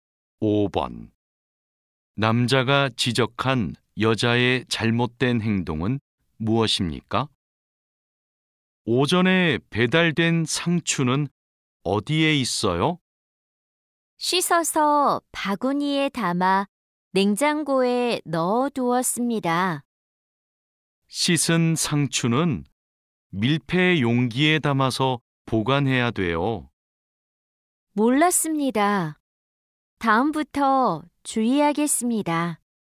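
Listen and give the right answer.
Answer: 씻은 상추를 밀폐 용기가 아닌 바구니에 담아 보관한 것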